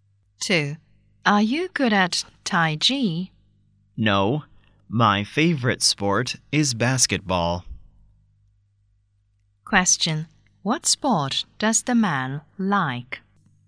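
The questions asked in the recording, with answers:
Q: What sport does the man like?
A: Basketball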